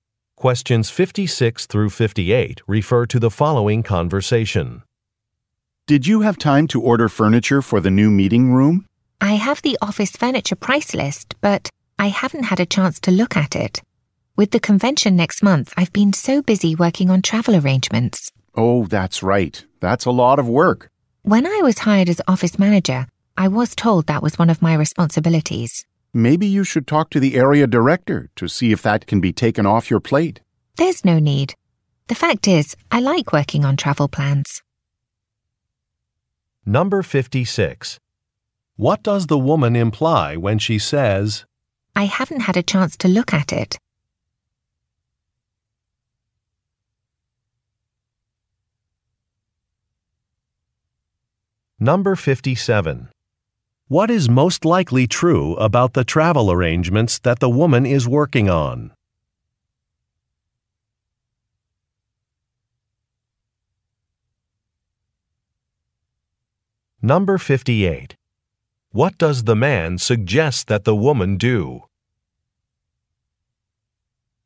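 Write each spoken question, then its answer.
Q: I haven't had a chance to look at it?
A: She hasn't ordered the furniture yet

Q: What is most likely true about the travel arrangements that the woman is working on?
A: They are for next month's convention

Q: What does the man suggest that the woman do?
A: Talk to the area director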